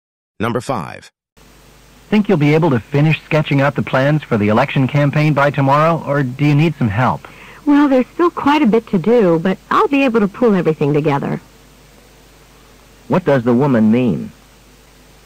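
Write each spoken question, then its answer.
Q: What does the woman mean?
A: She can finish the plans by herself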